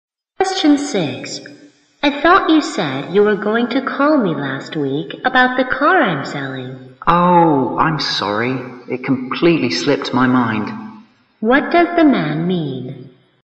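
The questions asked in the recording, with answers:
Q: What does the man mean?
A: He forgot to call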